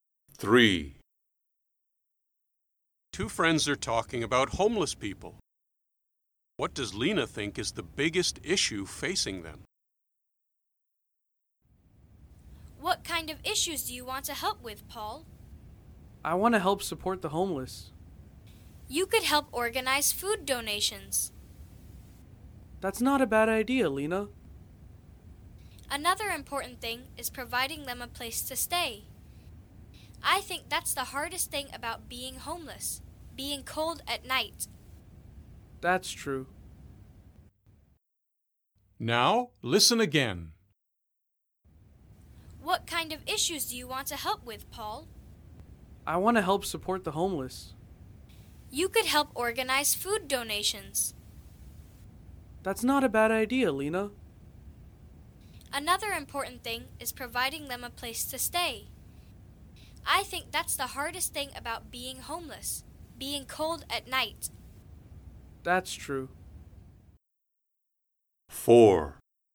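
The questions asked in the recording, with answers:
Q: What does Lena think is the biggest issue facing them?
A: Having a place to stay (being cold at night)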